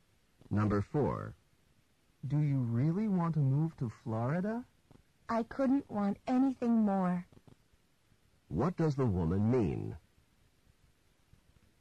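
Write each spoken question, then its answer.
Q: What does the woman mean?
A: She really wants to move to Florida.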